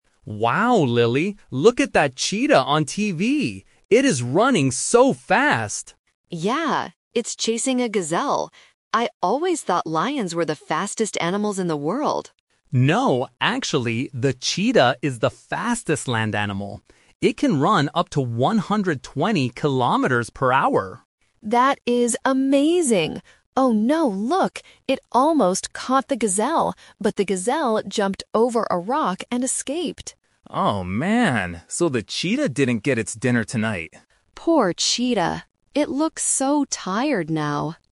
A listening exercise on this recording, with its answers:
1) What is the cheetah doing on the TV program?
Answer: Chasing a gazelle.

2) What did Lily believe before watching this program?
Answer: Lions are the fastest animals.

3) What happens at the end of the video?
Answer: The gazelle runs away safely.

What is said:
Tom: Wow, Lily, look at that cheetah on TV! It is running so fast!
Lily: Yeah! It's chasing a gazelle. I always thought lions were the fastest animals in the world.
Tom: No, actually, the cheetah is the fastest land animal. It can run up to 120 kilometers per hour.
Lily: That is amazing! Oh no, look! It almost caught the gazelle, but the gazelle jumped over a rock and escaped.
Tom: Oh, man. So the cheetah didn't get its dinner tonight.